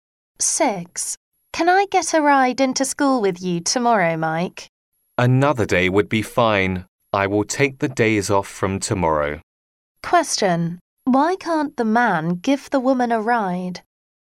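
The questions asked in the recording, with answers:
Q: Why can't the man give the woman a ride?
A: He will take days off from tomorrow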